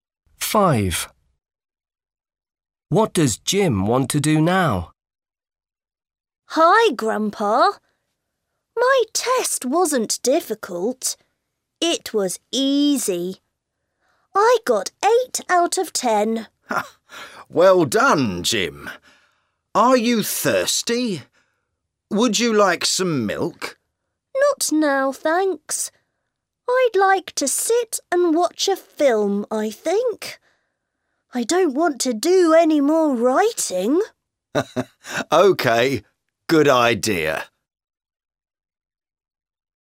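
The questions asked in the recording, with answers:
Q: What does Jim want to do now?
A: watch a film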